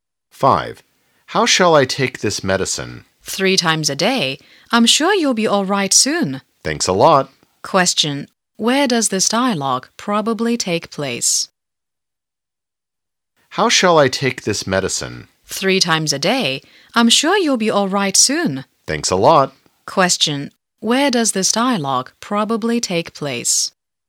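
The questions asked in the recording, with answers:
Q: Where does this dialogue probably take place?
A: In a hospital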